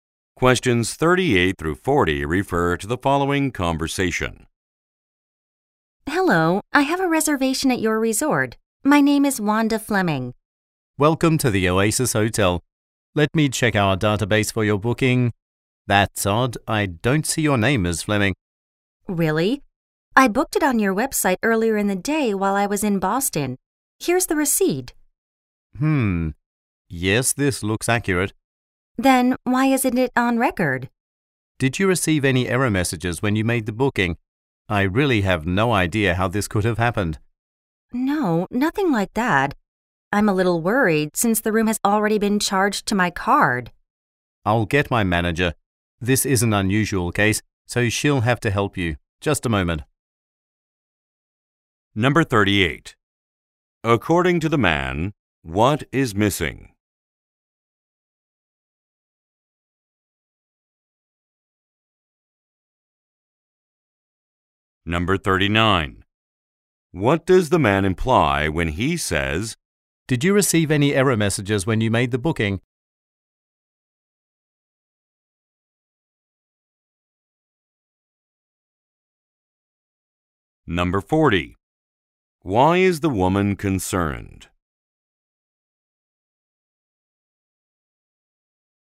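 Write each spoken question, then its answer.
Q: According to the man, what is missing?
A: The woman's reservation record

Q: Why is the woman concerned?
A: The room has already been charged to her card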